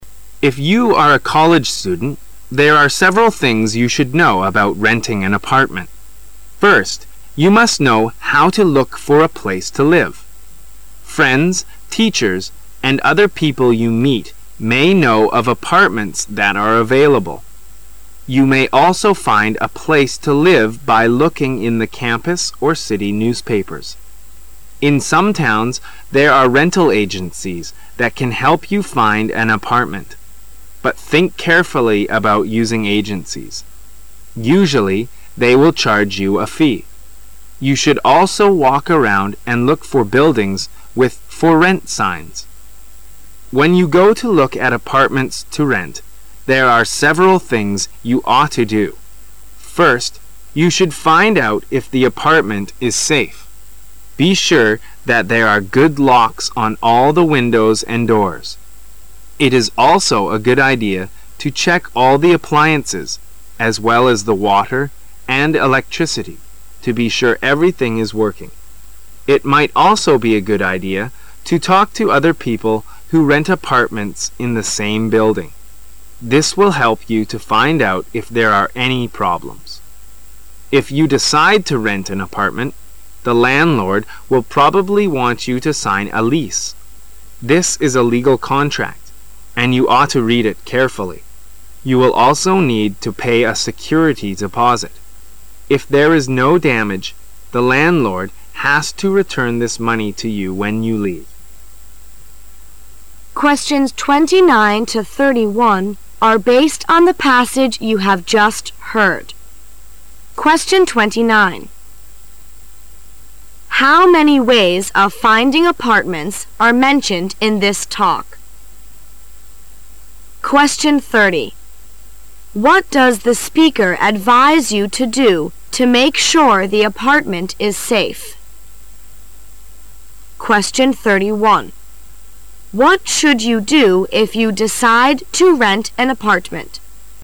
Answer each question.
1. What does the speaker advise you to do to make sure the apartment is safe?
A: Make sure there are good locks on all the windows and doors.

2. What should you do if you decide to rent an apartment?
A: Sign the contract and pay a security deposit.

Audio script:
[解析] 29-31 If you are a college student, there are several things you should know about renting an apartment. First, you must know how to look for a place to live. Friends, teachers, and other people you meet may know of apartments that are available. You may also find a place to live by looking in the campus or city newspapers. In some towns, there are rental agencies that can help you find an apartment, but think carefully about using agencies. Usually they will charge you a fee. You should also walk around and look for buildings with For Rent signs. When you go to look at apartments to rent, there are several things you ought to do. First, you should find out if the apartment is safe. Be sure there are good locks on all the windows and doors. It is also a good idea to check all the appliances as well as the water and electricity to be sure everything is working. It might also be a good idea to talk to other people who rent apartments in the same building. This will help you to find out if there are any problems. If you decide to rent an apartment, the landlord will probably want you to sign a lease. This is a legal contract, and you ought to read it carefully. You will also need to pay a security deposit. If there is no damage, the landlord has to return this money to you when you leave. How many ways of finding apartments are mentioned in this talk?